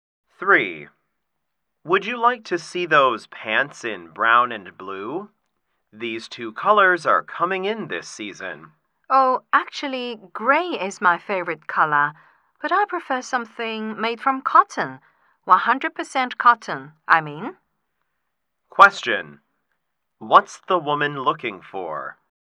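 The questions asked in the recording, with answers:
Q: What's the woman looking for?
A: Gray pants made of 100% cotton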